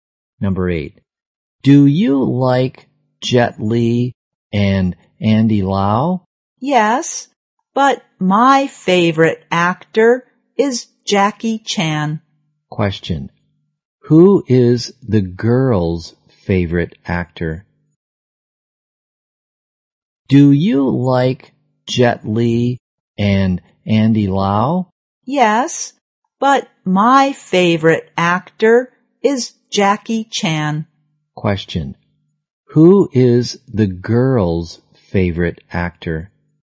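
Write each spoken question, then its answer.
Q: who is the girl's favorite actor?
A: Jackie Chan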